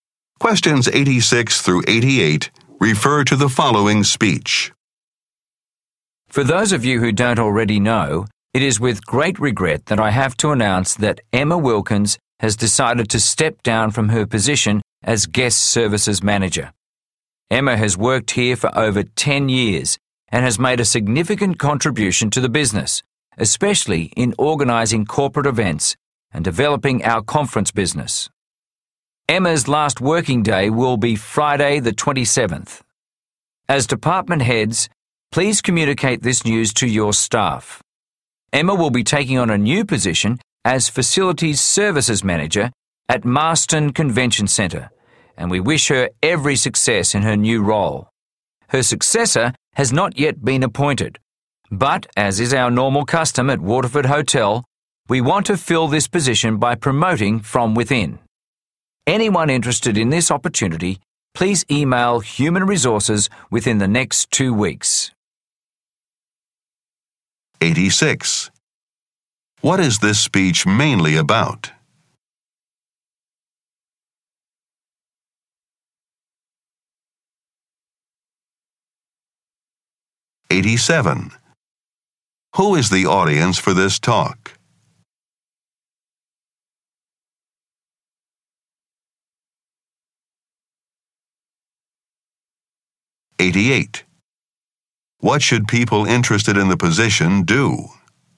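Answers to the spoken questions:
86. Emma Wilkins leaving her position
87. Department heads
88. Email Human Resources within 2 weeks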